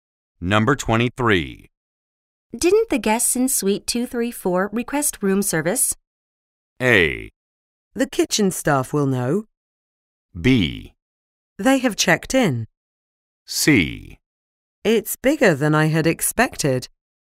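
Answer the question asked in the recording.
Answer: A: The kitchen staff will know.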